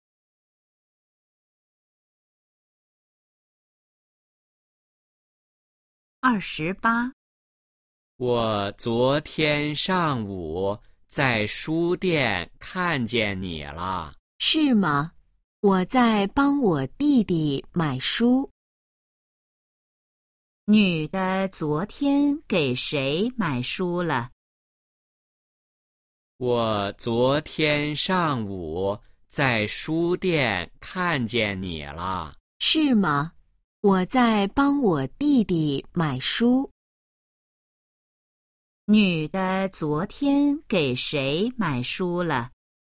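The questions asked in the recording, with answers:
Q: 女的昨天给谁买书了?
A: 她弟弟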